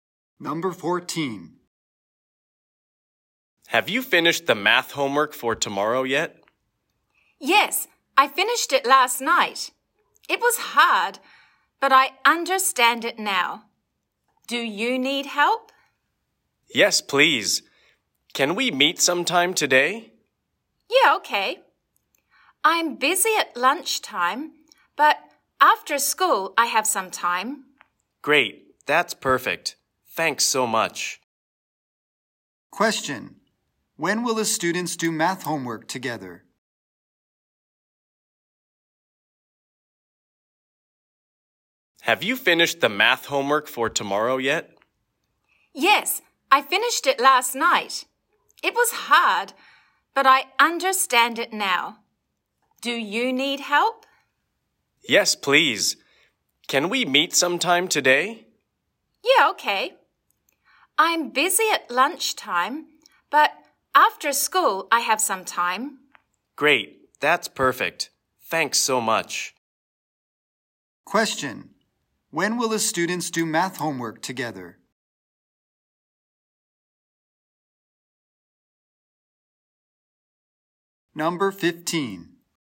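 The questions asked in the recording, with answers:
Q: When will the students do math homework together?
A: After school today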